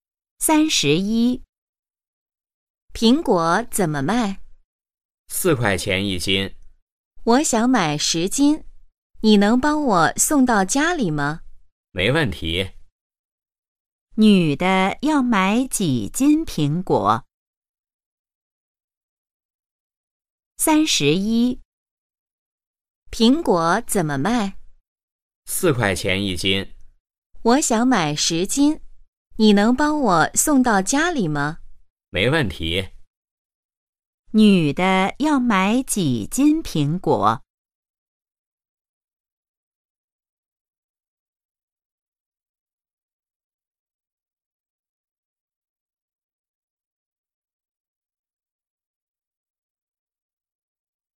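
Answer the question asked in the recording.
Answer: 10斤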